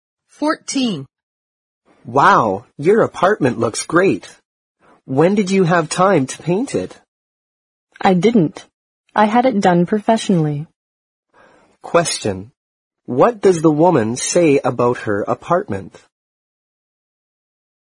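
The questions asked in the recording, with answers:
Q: What does the woman say about her apartment?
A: She had it painted by professionals.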